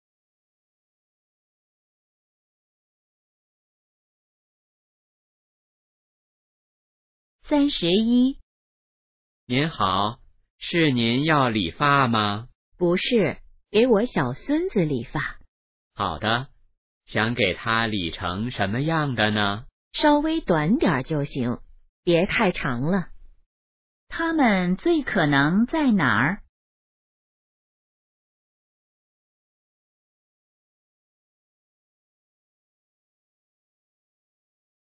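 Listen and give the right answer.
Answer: 理发店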